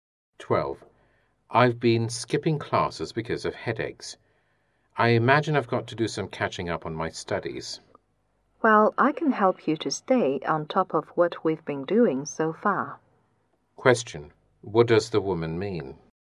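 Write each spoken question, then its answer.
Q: What does the woman mean?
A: She will help him catch up with his studies.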